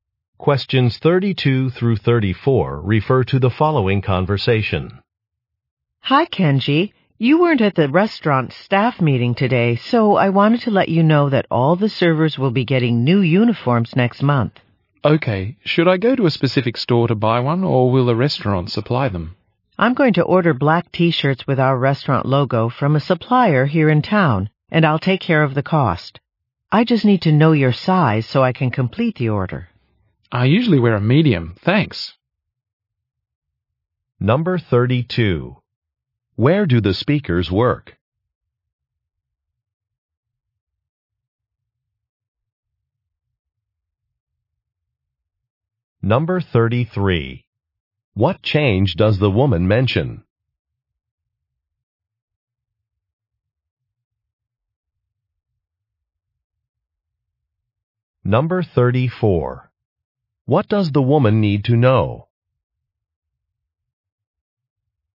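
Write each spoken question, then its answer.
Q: Where do the speakers work?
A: At a restaurant

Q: What change does the woman mention?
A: Servers will get new uniforms next month

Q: What does the woman need to know?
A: The man's shirt size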